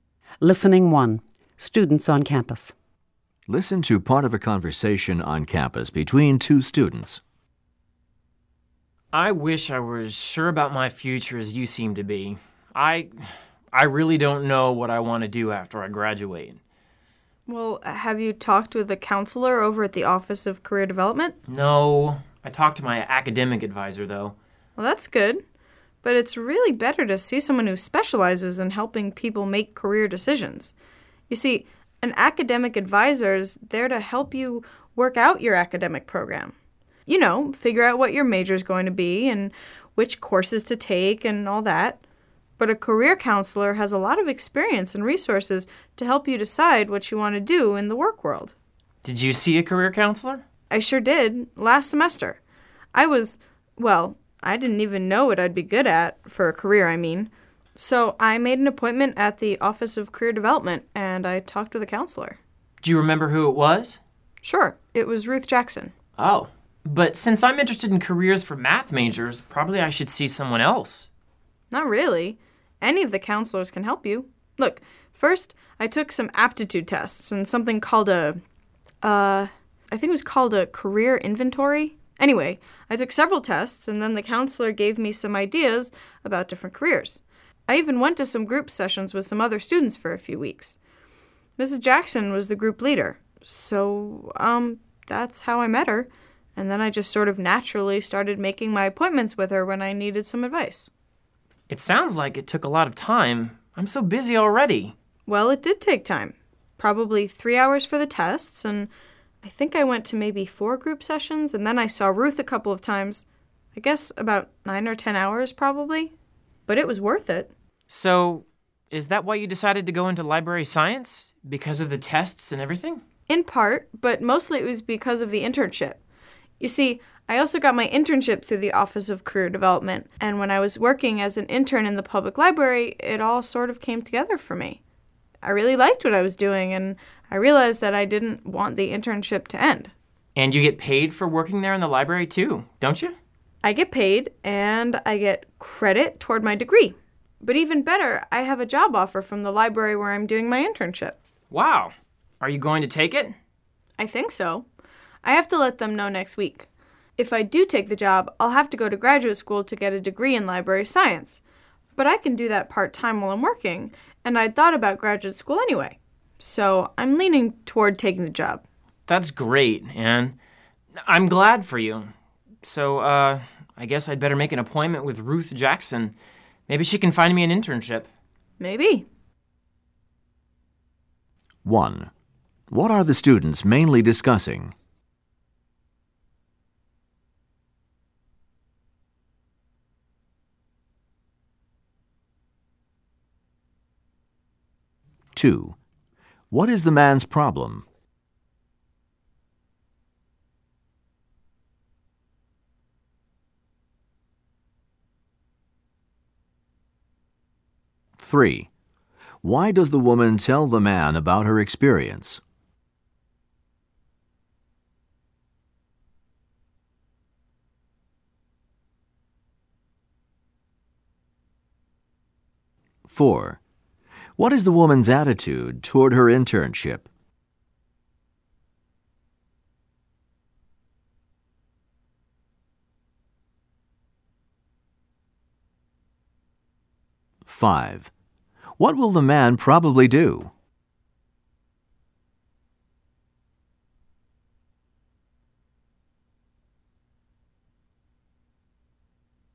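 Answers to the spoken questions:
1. Career planning and seeing a career counselor
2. He doesn't know what career he wants after graduation
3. To encourage him to see a career counselor
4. Very positive; she enjoys it and wants to keep working there
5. Make an appointment with Ruth Jackson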